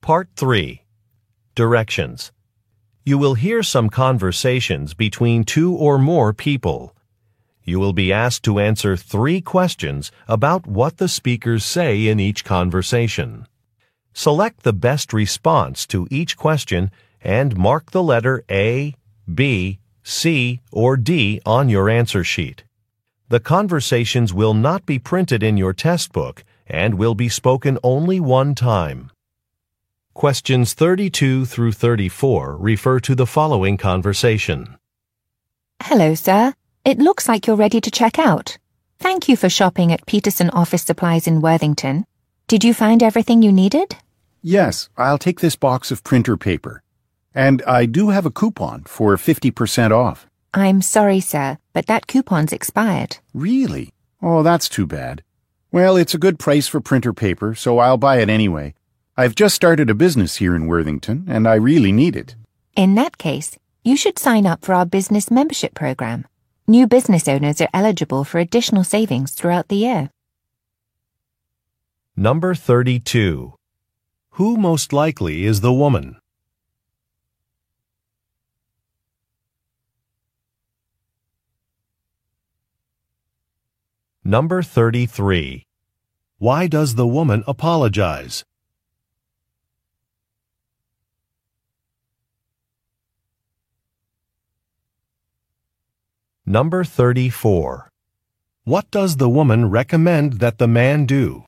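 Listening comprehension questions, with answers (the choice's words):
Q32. Who most likely is the woman?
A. A delivery driver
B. A bark teller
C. A store cashier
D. A graphic designer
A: A store cashier

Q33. Why does the woman apologize?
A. Her manager is not available.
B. A coupon has expired.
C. A fee has increased.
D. A package is missing.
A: A coupon has expired.

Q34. What does the woman recommend that the man do?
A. Return the next day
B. Register for a membership program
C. Read some instructions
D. Request technical support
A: Register for a membership program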